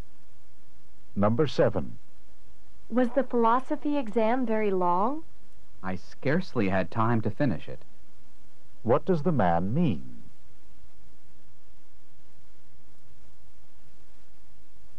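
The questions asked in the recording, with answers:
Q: What does the man mean?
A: The exam was long; he barely had time to finish it.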